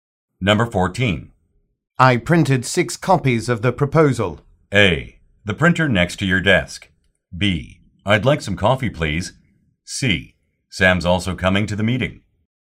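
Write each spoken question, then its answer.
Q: I printed 6 copies of the proposal.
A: C: Sam's also coming to the meeting.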